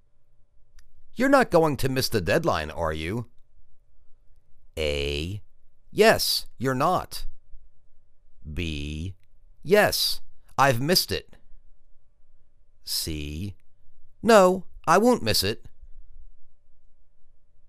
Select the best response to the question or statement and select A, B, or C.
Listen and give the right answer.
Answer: No, I won't miss it.